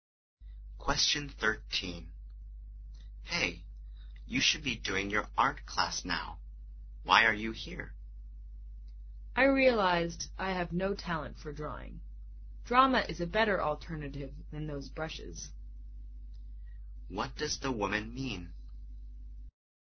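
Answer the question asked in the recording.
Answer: She has switched to drama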